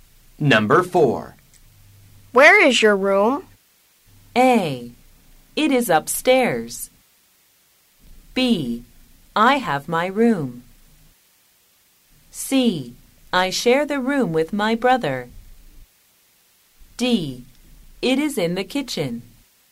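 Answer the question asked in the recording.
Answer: A: It is upstairs.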